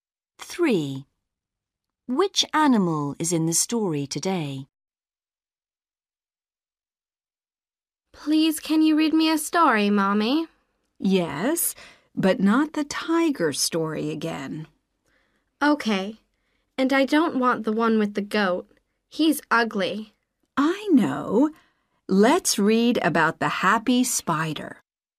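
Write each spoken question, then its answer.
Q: Which animal is in the story today?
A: A spider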